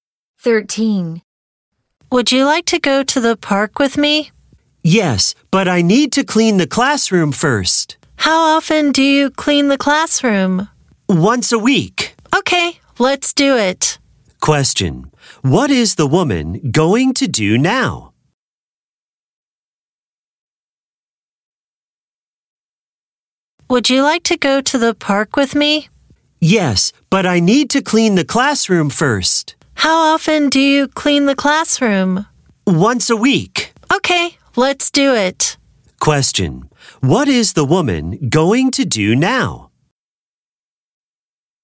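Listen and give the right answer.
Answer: Clean the classroom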